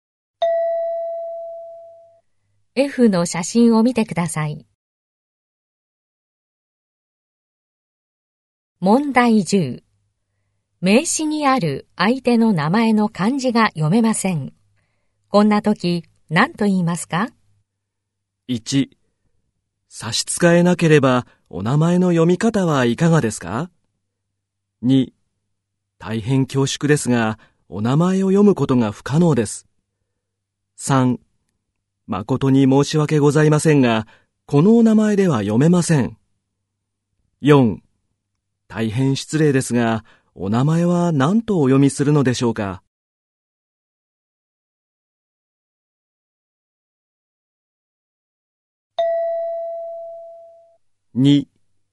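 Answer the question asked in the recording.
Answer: 4: 大変失礼ですが、お名前は何とお読みするのでしょうか?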